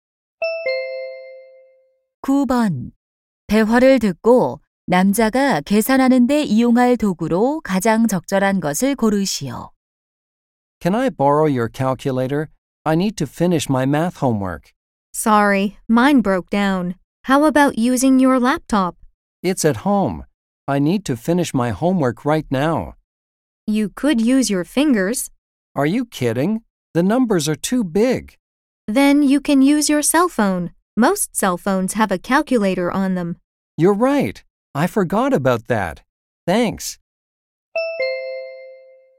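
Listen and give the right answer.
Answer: 휴대전화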